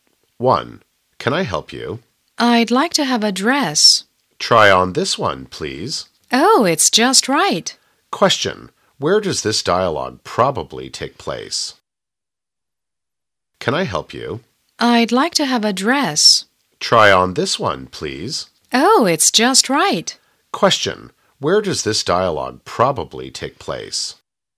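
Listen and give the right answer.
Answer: In a clothes shop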